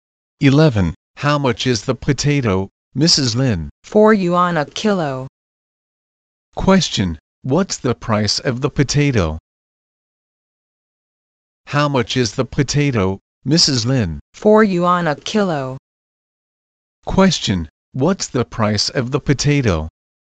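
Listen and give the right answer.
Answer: 4 yuan a kilo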